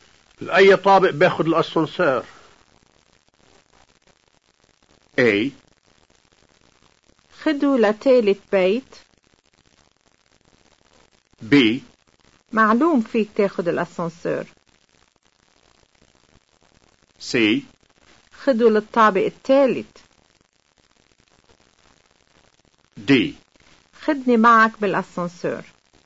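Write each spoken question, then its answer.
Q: لأي طابق بياخد الأسانسير؟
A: C: خدوا للطابق التالت.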